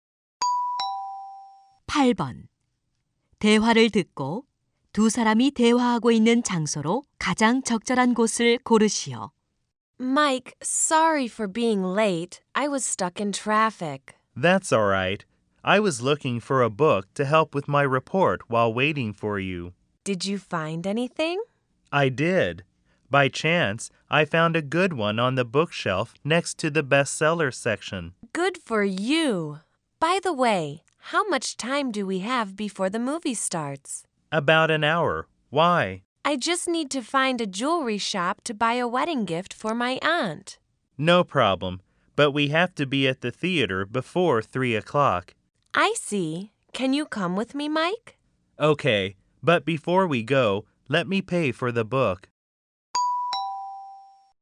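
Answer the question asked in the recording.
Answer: 서점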